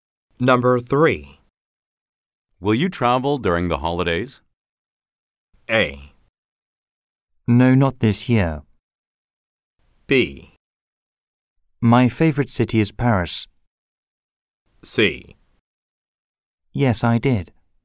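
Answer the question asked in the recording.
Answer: A: No, not this year.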